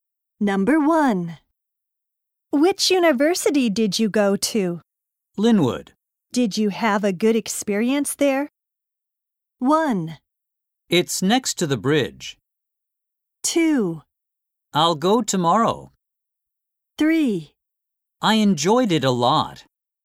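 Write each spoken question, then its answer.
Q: Did you have a good experience there?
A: 3: I enjoyed it a lot.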